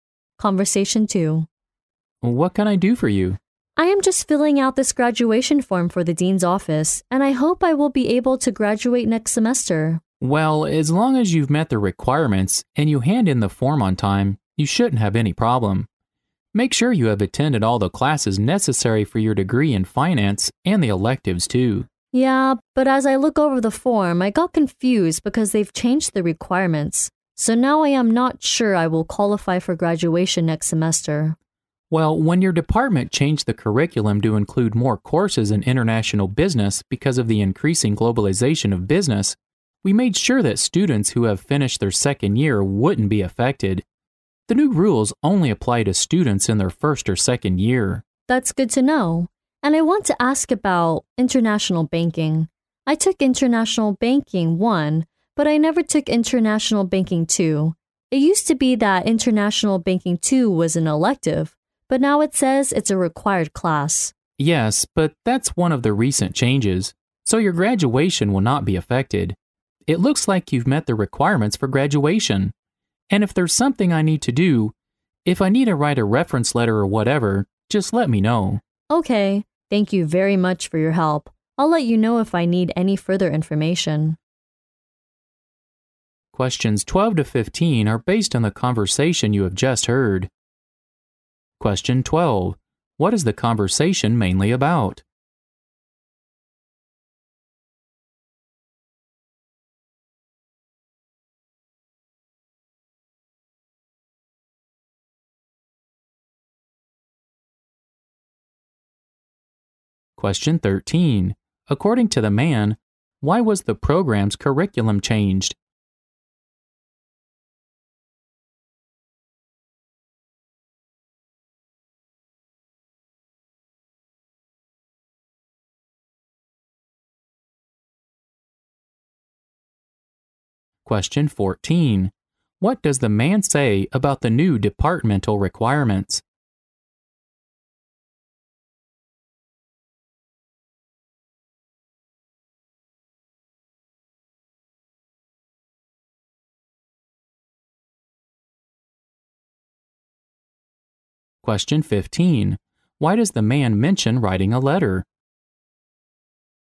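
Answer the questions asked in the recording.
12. The student's graduation requirements and whether he can graduate next semester
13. Because of the increasing globalization of business
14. They apply only to first- and second-year students, so they don't affect the student's graduation
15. To offer further help, such as writing a reference letter, if the student needs it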